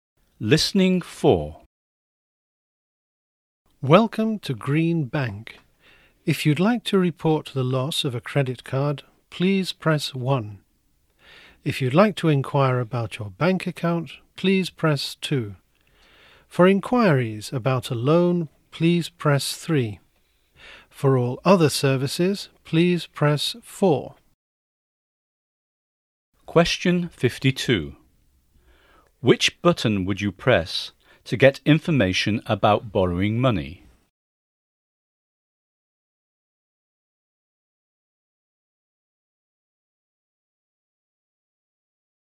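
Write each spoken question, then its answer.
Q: Which button would you press to get information about borrowing money?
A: Button 3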